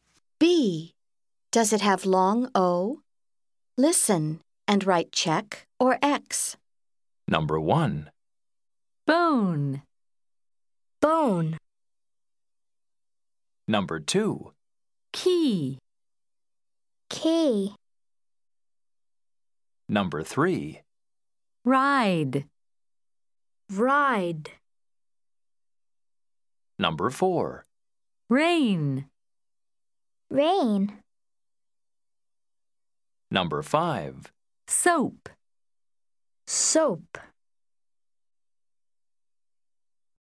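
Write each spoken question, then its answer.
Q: Does it have long O?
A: Yes (bone)

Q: Does it have long O?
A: No (key)

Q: Does it have long O?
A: No (ride)

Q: Does it have long O?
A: No (rain)

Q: Does it have long O?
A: Yes (soap)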